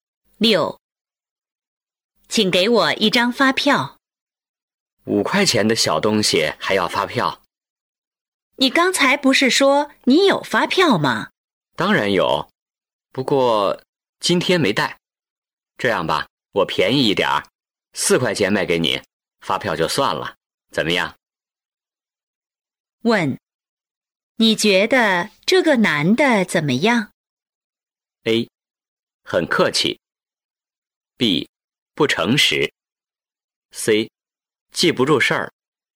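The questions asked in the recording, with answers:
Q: 问,你觉得这个男的怎么样?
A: B: 不诚实。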